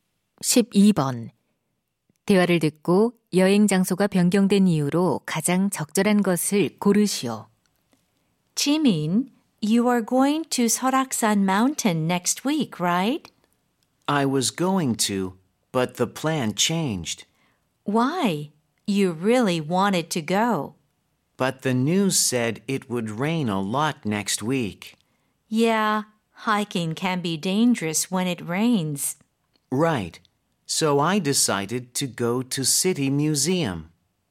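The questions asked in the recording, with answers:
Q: 대화를 듣고 여행 장소가 변경된 이유로 가장 적절한 것을 고르시오.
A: 다음 주에 비가 많이 올 것이라서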